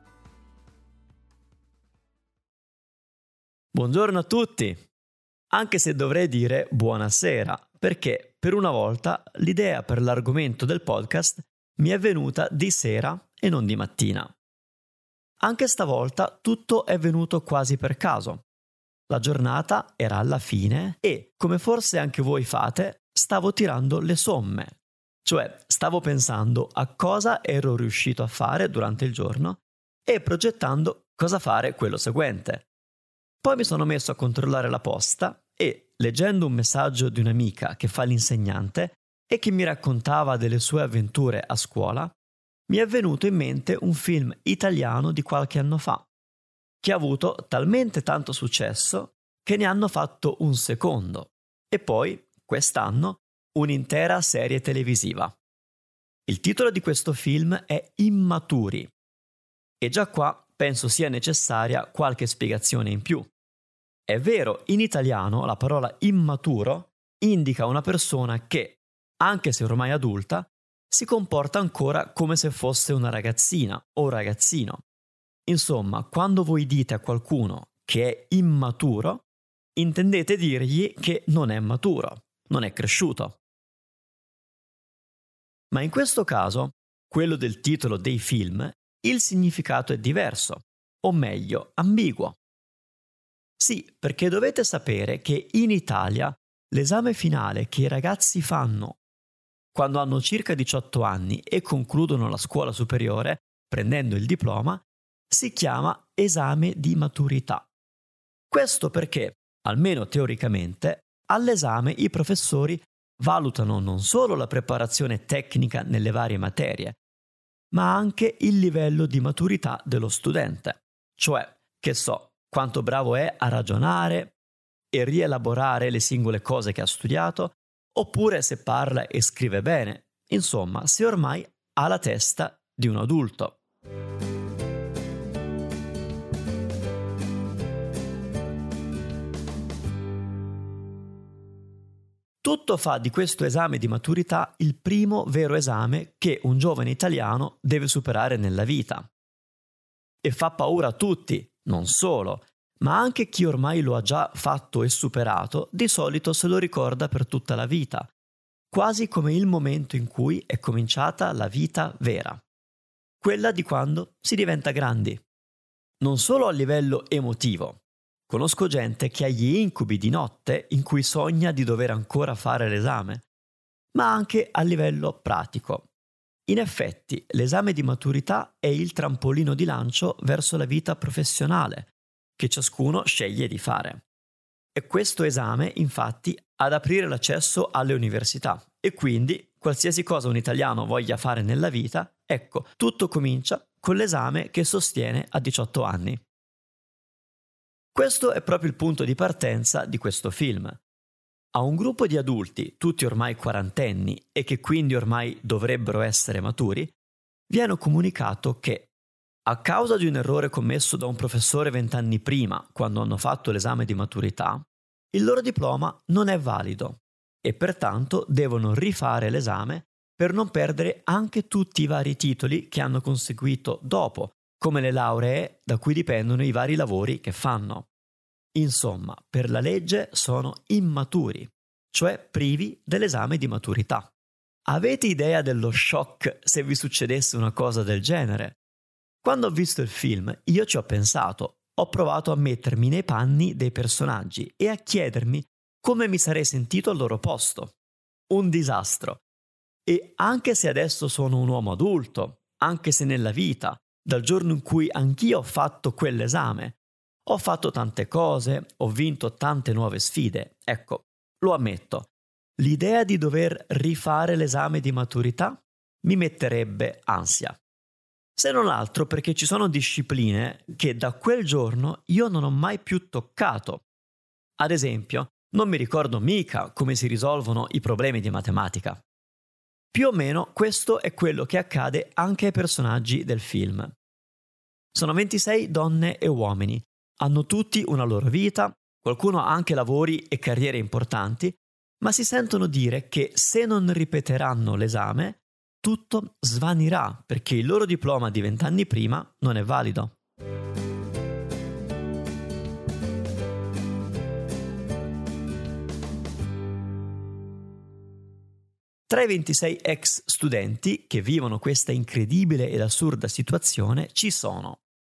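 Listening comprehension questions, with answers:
Here are your TRUE/ FALSE Comprehension questions.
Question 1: Manu non avrebbe paura a rifare l'esame di maturità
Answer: Falso

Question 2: Il titolo del film non è ambiguo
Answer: Falso

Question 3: Solo chi ha superato l'esame di maturità può andare all'università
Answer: Vero

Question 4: I protagonisti sono spaventati all'idea di rifare l'esame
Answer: Vero

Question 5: Per un italiano l'idea di rifare l'esame di maturità è un incubo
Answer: Vero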